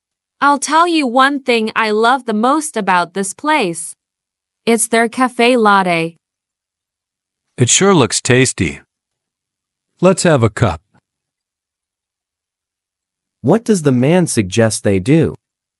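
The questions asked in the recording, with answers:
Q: What does the man suggest they do?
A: Have a cup of cafe latte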